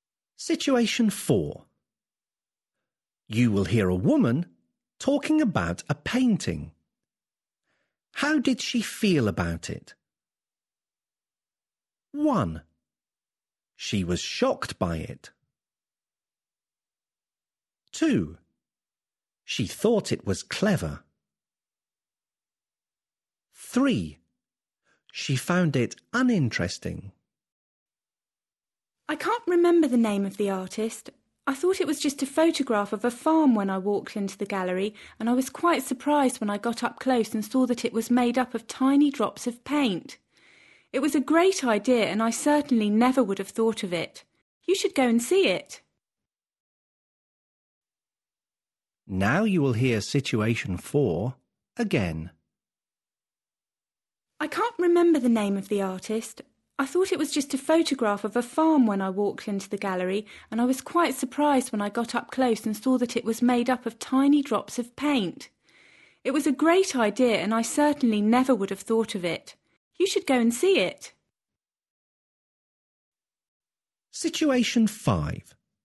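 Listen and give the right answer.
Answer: 2: She thought it was clever.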